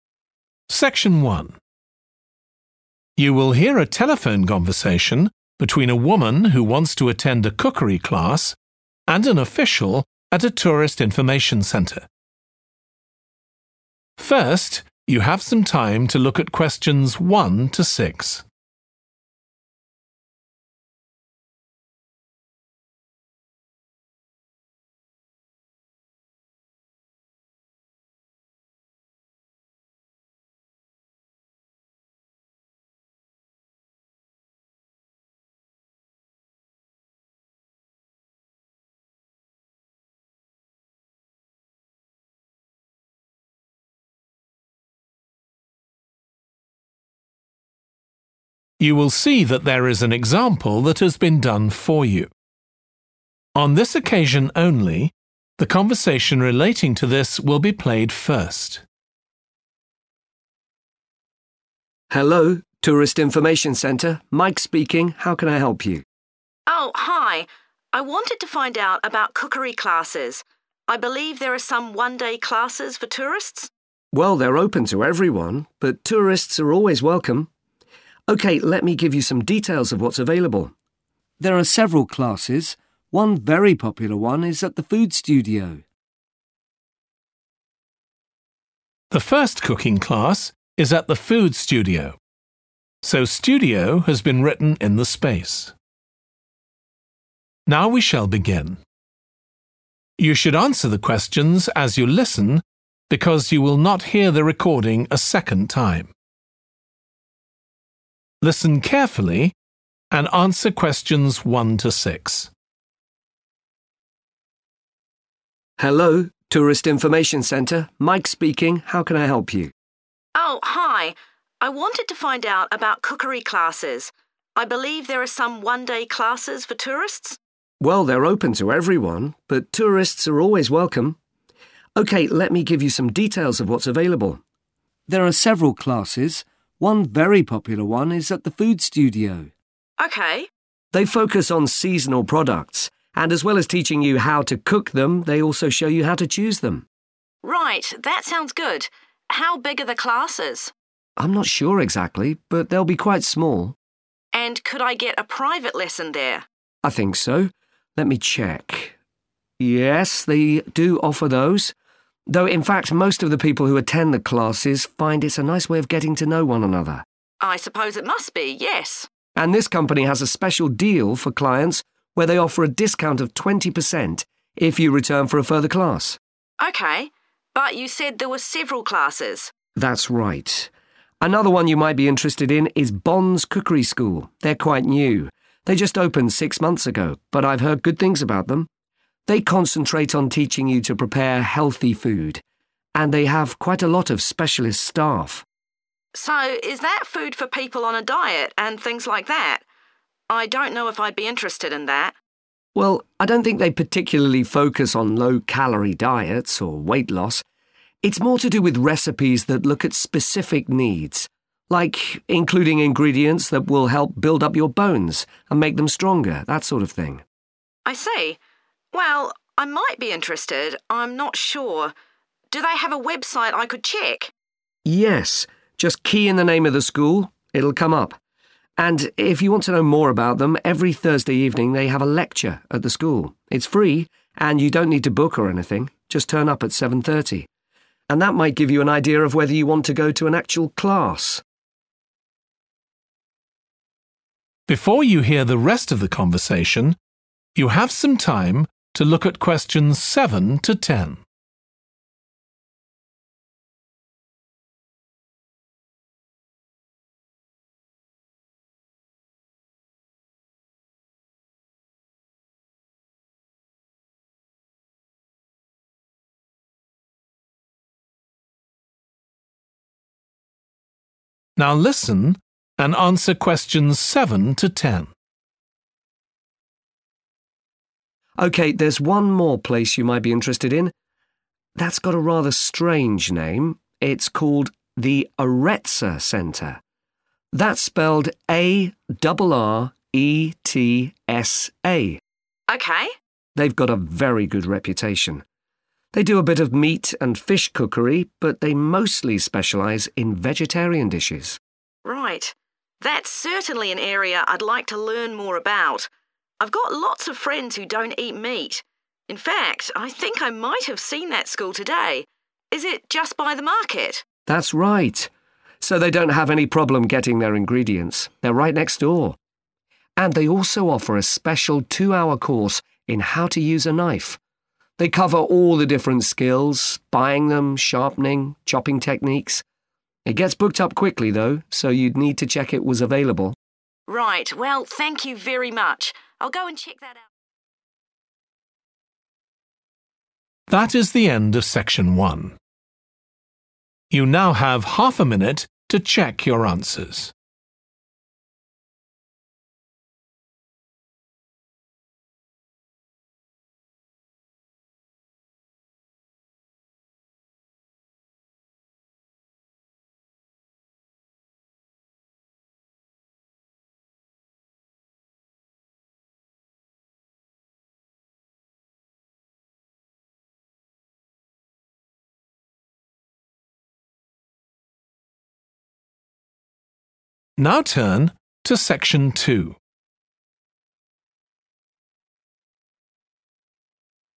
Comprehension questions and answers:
Complete the table below. Write ONE WORD AND/OR A NUMBER for each answer.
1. how to _____ and cook with seasonal products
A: choose

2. also offers _____ classes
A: private

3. clients who return get a _____ discount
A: 20% / 20 percent

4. food that is _____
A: healthy

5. includes recipes to strengthen your _____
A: bones

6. they have a free _____ Every Thursday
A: lecture

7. The _____ Centre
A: Arretsa

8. mainly _____ food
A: vegetarian

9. located near the _____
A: market

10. a special course in skills with a _____ is sometimes available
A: knife

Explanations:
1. The correct answer is 'choose' because in the excerpt, it is explained that the cookery class not only teaches how to cook with seasonal products but also how to choose them.
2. The correct answer "private" is right because the question asks about a lesson for only one person. This means it is a private lesson, not a group lesson.
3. The correct answer matches the information in the excerpt, specifying the exact discount amount of twenty percent offered to returning clients for another class.
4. The correct answer is 'healthy' because it directly matches the focus on teaching people to prepare healthy food as mentioned in the excerpt.
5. The correct answer is 'bones' because it directly relates to the need for recipes that can help build up your bones, as highlighted in the excerpt where it mentions making bones stronger.
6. The correct answer 'lecture' fits perfectly as it matches the type of event described in the excerpt. In a lecture, information is typically conveyed to an audience, which aligns with the idea of a regular informational session happening on Thursday evenings at the school.
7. The correct answer is Arretsa because it is the name given in the transcript for the place that offers cookery classes.
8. The correct answer 'vegetarian' matches the information because it describes a type of food that excludes meat and fish, which aligns with the emphasis on vegetarian dishes at the cookery school mentioned in the excerpt.
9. The correct answer is 'market' because in the transcript, the woman directly asks if the cooking school is near the market. This indicates that the school is located close to this place where people shop for food.
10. The correct answer is 'knife' because the excerpt specifically mentions a course focused on teaching individuals how to use a knife, which is an essential tool in cooking.

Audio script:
OFFICIAL: Hello, Tourist Information Centre, Mike speaking, how can I help you?
WOMAN: Oh, hi. I wanted to find out about cookery classes. I believe there are some one-day classes for tourists?
OFFICIAL: Well, they're open to everyone, but tourists are always welcome. OK, let me give you some details of what's available. There are several classes. One very popular one is at the Food Studio.
WOMAN: OK
OFFICIAL: They focus on seasonal products, and as well as teaching you how to cook them, they also show you how to choose them.
WOMAN: Right, that sounds good. How big are the classes?
OFFICIAL: I'm not sure exactly, but they'll be quite small.
WOMAN: And could I get a private lesson there?
OFFICIAL: I think so ... let me check, yes, they do offer those. Though in fact most of the people who attend the classes find it's a nice way of getting to know one another.
WOMAN: I suppose it must be, yes.
OFFICIAL: And this company has a special deal for clients where they offer a discount of 20 percent if you return for a further class.
WOMAN: OK. But you said there were several classes?
OFFICIAL: That's right. Another one you might be interested in is Bond's Cookery School. They're quite new, they just opened six months ago, but I've heard good things about them. They concentrate on teaching you to prepare healthy food, and they have quite a lot of specialist staff.
WOMAN: So is that food for people on a diet and things like that? I don't know if I'd be interested in that.
OFFICIAL: Well, I don't think they particularly focus on low calorie diets or weight loss. It's more to do with recipes that look at specific needs, like including ingredients that will help build up your bones and make them stronger, that sort of thing.
WOMAN: I see. Well, I might be interested, I'm not sure. Do they have a website I could check?
OFFICIAL: Yes, just key in the name of the school – it'll come up. And if you want to know more about them, every Thursday evening they have a lecture at the school. It's free and you don't need to book or anything, just turn up at 7.30. And that might give you an idea of whether you want to go to an actual class.
OFFICIAL: OK, there's one more place you might be interested in. That's got a rather strange name, it's called The Arretsa Centre – that's spelled A-R-R-E-T-S-A.
WOMAN: OK.
OFFICIAL: They've got a very good reputation. They do a bit of meat and fish cookery but they mostly specialise in vegetarian dishes.
WOMAN: Right. That's certainly an area I'd like to learn more about. I've got lots of friends who don't eat meat. In fact, I think I might have seen that school today. Is it just by the market?
OFFICIAL: That's right. So they don't have any problem getting their ingredients. They're right next door. And they also offer a special two-hour course in how to use a knife. They cover all the different skills – buying them, sharpening, chopping techniques. It gets booked up quickly though so you'd need to check it was available.
WOMAN: Right, well thank you very much. I'll go and ...